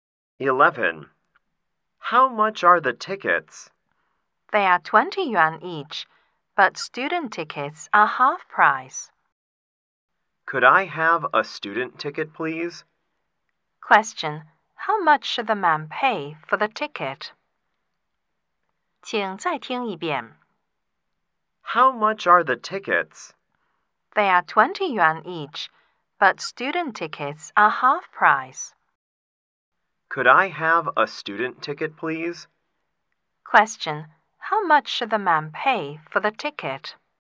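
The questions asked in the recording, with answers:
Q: How much should the man pay for the ticket?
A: 10 yuan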